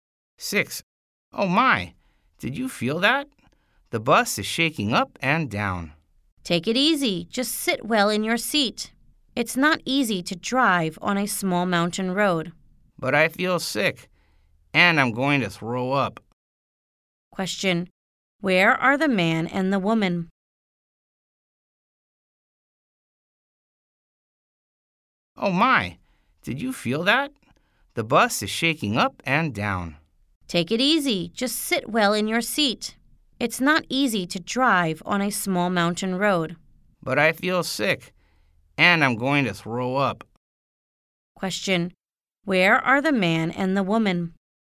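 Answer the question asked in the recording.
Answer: On a bus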